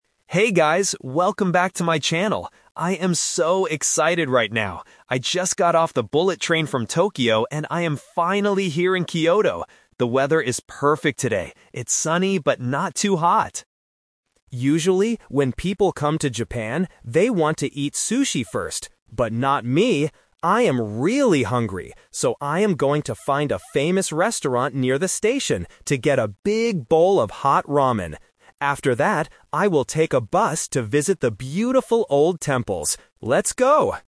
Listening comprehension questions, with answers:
Listen to a travel vlogger starting a new video. Choose the correct answer (A, B, or C) for each question.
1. Where did the vlogger travel from today?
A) Kyoto.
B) Tokyo.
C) Osaka.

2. What is the vlogger going to eat first?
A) Sushi.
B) Ramen.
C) A station sandwich.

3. What will the vlogger do after finishing the meal?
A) Take a bullet train.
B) Go to the hotel to rest.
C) Visit some old temples.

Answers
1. B) Tokyo.
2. B) Ramen.
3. C) Visit some old temples.

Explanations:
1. The vlogger says, "I just got off the bullet train from Tokyo." Option (A) is a trap because Kyoto is where the vlogger is right now (the destination), not where he traveled from. Option (C) is not mentioned in the audio.
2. This is The Twist. The vlogger mentions that other people want to eat sushi first, "But not me!... I am going to find a famous restaurant... to get a big bowl of hot ramen." Option (A) is the trap (what other people do). Option (C) is not mentioned.
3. The vlogger clearly states his future plan: "After that, I will take a bus to visit the beautiful old temples." Option (A) is a trap because taking the bullet train is an action he already completed in the past. Option (B) is a plausible real-life action but is not mentioned.

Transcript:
Vlogger: Hey guys, welcome back to my channel! I am so excited right now. I just got off the bullet train from Tokyo, and I am finally here in Kyoto! The weather is perfect today, it's sunny but not too hot.
Usually, when people come to Japan, they want to eat sushi first. But not me! I am really hungry, so I am going to find a famous restaurant near the station to get a big bowl of hot ramen. After that, I will take a bus to visit the beautiful old temples. Let's go!

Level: A2

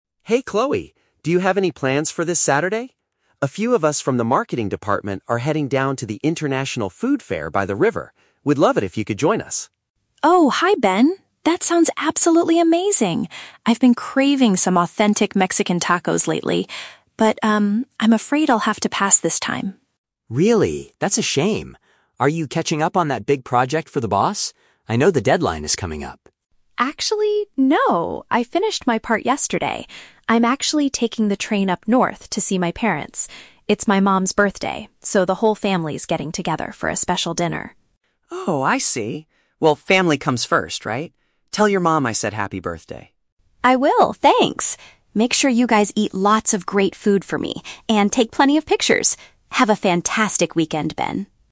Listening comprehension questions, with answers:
Listen to a conversation between two colleagues and choose the correct answer (A, B, or C) for each question.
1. Why does Ben start the conversation with Chloe?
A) To ask if she wants to attend a culinary event with some coworkers.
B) To remind her about an upcoming deadline for a difficult project.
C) To invite her to a new Mexican restaurant near their office.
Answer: A) To ask if she wants to attend a culinary event with some coworkers.

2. What is the real reason Chloe declines the invitation?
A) She has to work overtime to finish her marketing tasks.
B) She is traveling to celebrate a relative's special occasion.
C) She already bought train tickets to go on a solo vacation.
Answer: B) She is traveling to celebrate a relative's special occasion.

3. What does Chloe tell Ben to do at the weekend?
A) Bring her back some traditional dishes from the festival.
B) Capture some visual memories of the trip and enjoy the meals.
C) Post a review of the food on the company's social media.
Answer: B) Capture some visual memories of the trip and enjoy the meals.

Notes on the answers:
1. Ben invites her to the "International Food Fair" with people from the "marketing department." Option (A) uses paraphrasing ("culinary event" = Food Fair; "coworkers" = people from the department). Option (B) is a trap; Ben later guesses she is working on a project, but that's not his reason for talking to her. Option (C) is a trap; Chloe mentions "Mexican tacos", but Ben is inviting her to a fair, not a restaurant.
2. Chloe explains that she is visiting her parents because it's her "mom's birthday." Option (B) perfectly paraphrases this ("relative's special occasion" = mom's birthday). Option (A) is a trap; Ben asks if she is working on a "big project," but she says she "finished my part yesterday." Option (C) is a trap; she is taking the train, but it is to see her family, not for a "solo vacation."
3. At the end of the conversation, Chloe tells Ben to "eat lots of great food" and "take plenty of pictures." Option (B) uses synonyms to express the same idea ("capture visual memories" = take pictures). Option (A) is a trap; she wishes she could eat tacos, but she never asks Ben to bring food back for her. Option (C) is plausible for colleagues in marketing, but it is never mentioned in the audio.

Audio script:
Ben: Hey Chloe, do you have any plans for this Saturday? A few of us from the marketing department are heading down to the International Food Fair by the river. We'd love it if you could join us.
Chloe: Oh, hi Ben. That sounds absolutely amazing! I've been craving some authentic Mexican tacos lately. But, um, I'm afraid I'll have to pass this time.
Ben: Really? That's a shame. Are you catching up on that big project for the boss? I know the deadline is coming up.
Chloe: Actually, no, I finished my part yesterday. I'm actually taking the train up north to see my parents. It's my mom's birthday, so the whole family is getting together for a special dinner.
Ben: Oh, I see! Well, family comes first, right? Tell your mom I said happy birthday.
Chloe: I will, thanks! Make sure you guys eat lots of great food for me, and take plenty of pictures! Have a fantastic weekend, Ben!

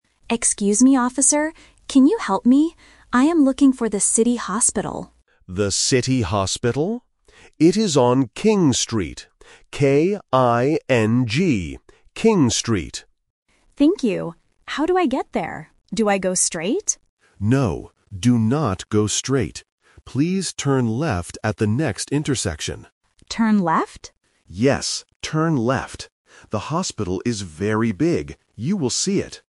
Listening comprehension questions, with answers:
Listen to the conversation between a tourist and a police officer. Read the questions and choose the correct answer (A, B, or C).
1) What place is the tourist looking for?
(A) The City Hotel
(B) The City Hospital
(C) The City Bank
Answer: (B) The City Hospital

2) What is the name of the street?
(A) King Street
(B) Ring Street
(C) Kim Street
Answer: (A) King Street

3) What direction does the police officer give?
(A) Go straight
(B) Turn right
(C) Turn left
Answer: (C) Turn left

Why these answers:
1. The tourist clearly says, "I am looking for the City Hospital," and the police officer repeats it. Why the traps are wrong: Option A is a phonetic trap ("Hotel" sounds similar to "Hospital" for beginners). Option C is a plausible place in a city but is never mentioned.
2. The police officer states the street name and spells it out slowly: "K-I-N-G. King Street." Why the traps are wrong: Options B and C are phonetic traps. "Ring" and "Kim" sound very similar to "King", testing if the student can follow the exact spelling provided in the audio.
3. The police officer says, "Please turn left at the next intersection," and confirms it again when the tourist asks. Why the traps are wrong: Option A is a trap because the tourist asks, "Do I go straight?", but the officer explicitly rejects it by saying, "No, do not go straight." Option B is a plausible direction but is not mentioned.

